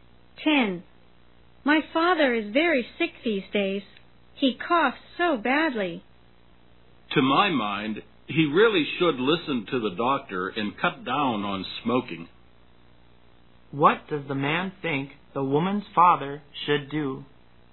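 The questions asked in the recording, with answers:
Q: What does the man think the woman's father should do?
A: Listen to the doctor and cut down on smoking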